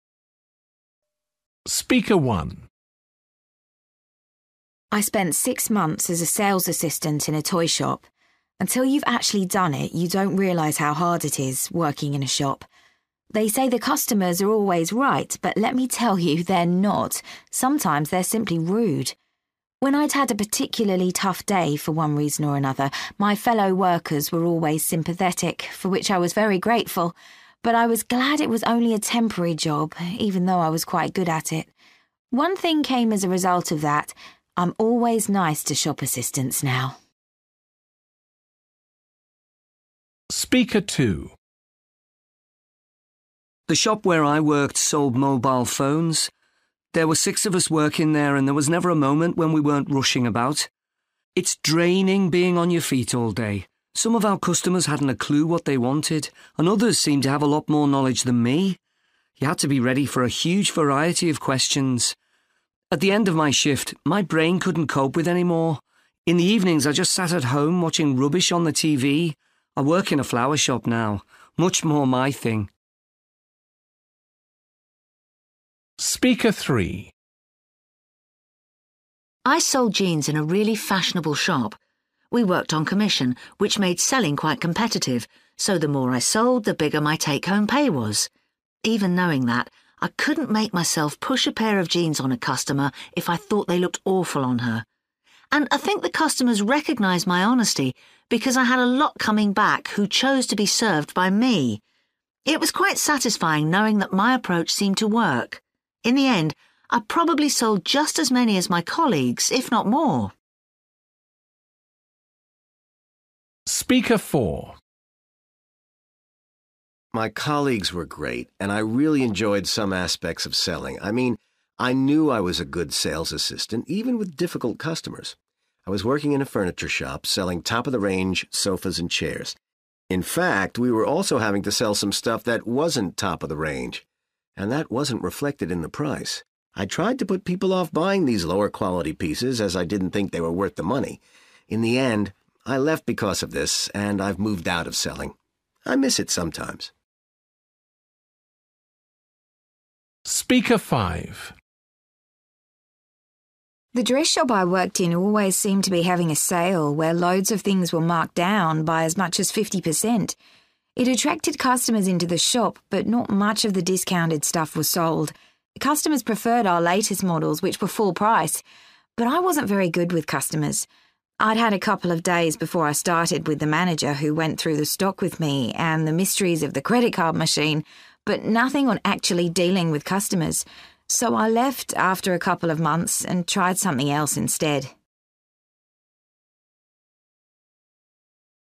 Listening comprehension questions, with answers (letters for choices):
For questions 19-23, choose from the options (A-H) what each person says about their experience.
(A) My confidence was sometimes affected by customers' attitudes.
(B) I was pleased to discover that I had a good way with customers.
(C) It made me appreciate the people I worked with.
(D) The training I received didn't equip me to do my job well.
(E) Customers were satisfied when they got a bargain.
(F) I wasn't happy with some of the products in the shop.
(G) It was motivating to sell more than the other assistants.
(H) It exhausted me both physically and mentally.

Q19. Speaker 1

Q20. Speaker 2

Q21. Speaker 3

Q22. Speaker 4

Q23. Speaker 5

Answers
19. C
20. H
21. B
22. F
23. D

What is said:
I spent six months as a sales assistant in a toy shop. Until you've actually done it, you don't realise how hard it is, working in a shop. They say the customers are always right but let me tell you, they're not! Sometimes they're simply rude. When I'd had a particularly tough day for one reason or another, my fellow workers were always sympathetic, for which I was very grateful. But I was glad it was only a temporary job, even though I was quite good at it. One thing came as a result of that ... I'm always nice to shop assistants now!
The shop where I worked sold mobile phones. There were six of us working there and there was never a moment when we weren't rushing about. It's draining being on your feet all day. Some of our customers hadn't a clue what they wanted and others seemed to have a lot more knowledge than me. You had to be ready for a huge variety of questions. At the end of my shift, my brain couldn't cope with any more! In the evenings I just sat at home watching rubbish on the TV. I work in a flower shop now – much more my thing!
I sold jeans in a really fashionable shop. We worked on commission, which made selling quite competitive, so the more I sold the bigger my take-home pay was. Even knowing that, I couldn't make myself push a pair of jeans on a customer if I thought they looked awful on her. And I think the customers recognised my honesty because I had a lot coming back who chose to be served by me. It was quite satisfying knowing that my approach seemed to work. In the end, I probably sold just as many as my colleagues, if not more.
My colleagues were great and I really enjoyed some aspects of selling. I mean, I knew I was a good sales assistant, even with difficult customers. I was working in a furniture shop selling top-of-the-range sofas and chairs. In fact, we were also having to sell some stuff that wasn't top of the range, and that wasn't reflected in the price. I tried to put people off buying these lower quality pieces as I didn't think they were worth the money. In the end, I left because of this and I've moved out of selling. I miss it sometimes.
The dress shop I worked in always seemed to be having a sale where loads of things were marked down by as much as 50%. It attracted customers into the shop but not much of the discounted stuff was sold. Customers preferred our latest models, which were full price. But I wasn't very good with customers. I'd had a couple of days before I started with the manager who went through the stock with me and the mysteries of the credit card machine but nothing on actually dealing with customers. So I left after a couple of months and tried something else instead.